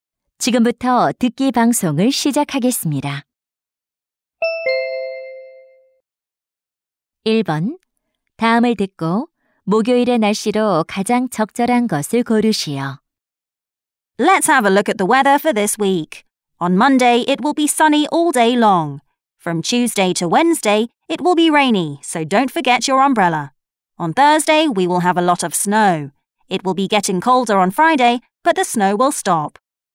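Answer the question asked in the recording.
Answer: 눈이 많이 옴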